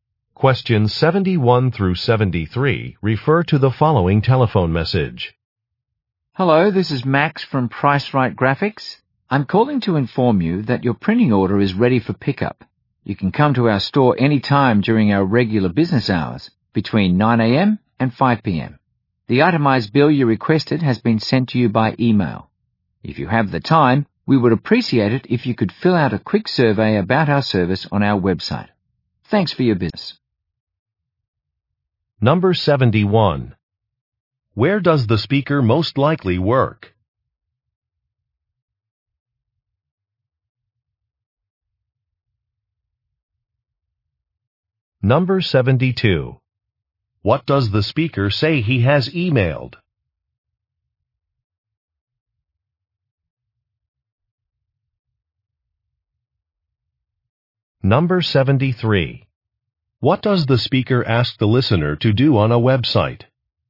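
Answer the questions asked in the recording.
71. At a printing company (Price Right Graphics)
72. An itemized bill
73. Fill out a survey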